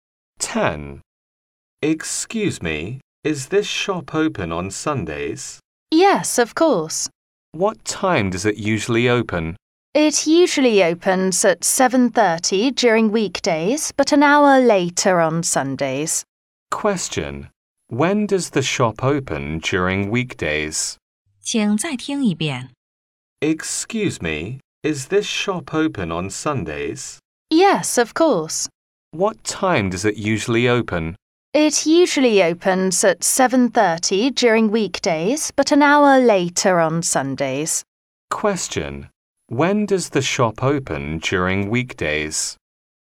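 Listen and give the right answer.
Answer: At 7:30.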